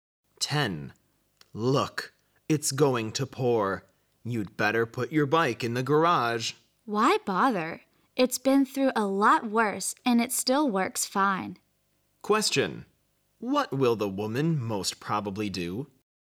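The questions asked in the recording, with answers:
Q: What will the woman most probably do?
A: Leave the bike outside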